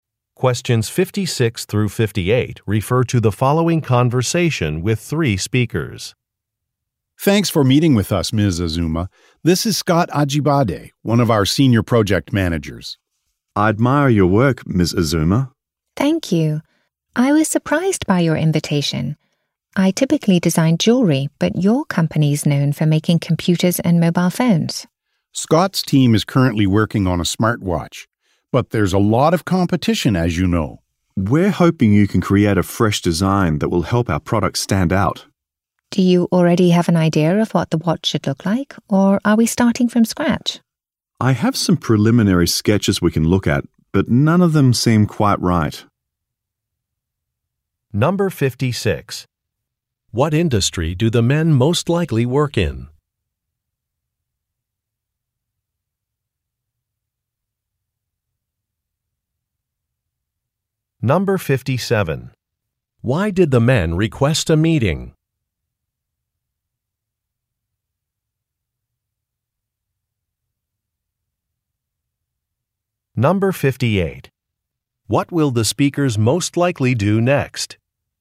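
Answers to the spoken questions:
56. Technology (computers and mobile phones)
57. To have her create a fresh design for their smartwatch
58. Look at some preliminary sketches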